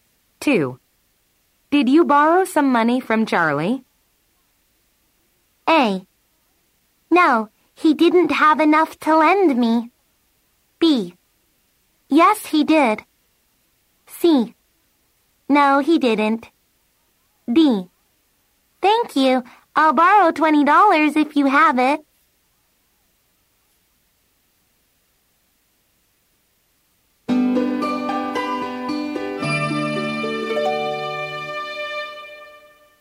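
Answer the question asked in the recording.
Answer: A: No, he didn't have enough to lend me.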